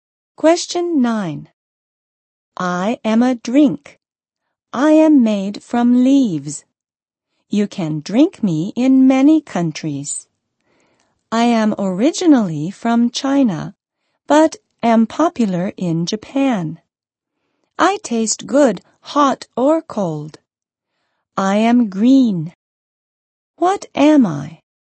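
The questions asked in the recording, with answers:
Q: What am I?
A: Green tea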